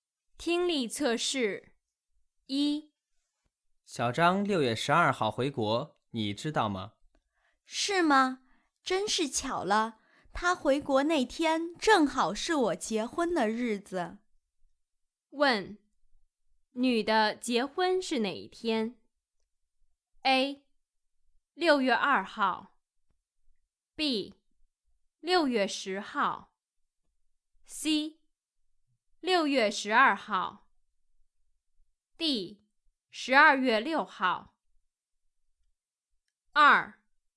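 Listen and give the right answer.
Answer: C: 6月12号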